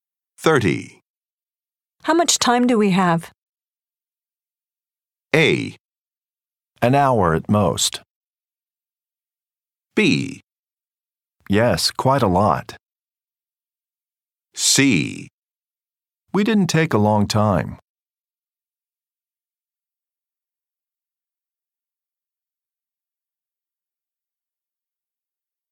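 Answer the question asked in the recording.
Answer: A: An hour at most.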